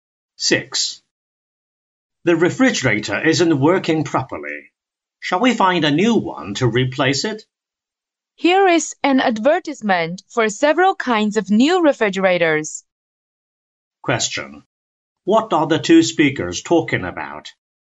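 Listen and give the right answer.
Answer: Buying a new refrigerator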